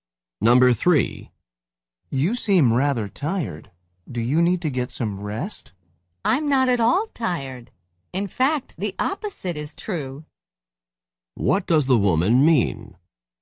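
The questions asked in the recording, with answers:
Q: What does the woman mean?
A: She is not tired; she is full of energy.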